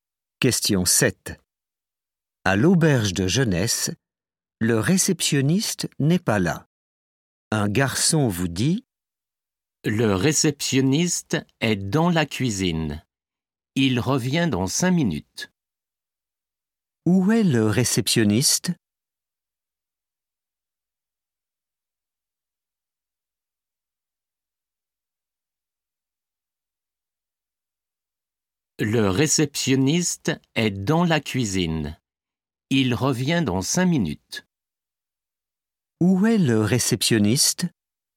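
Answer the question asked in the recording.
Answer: Dans la cuisine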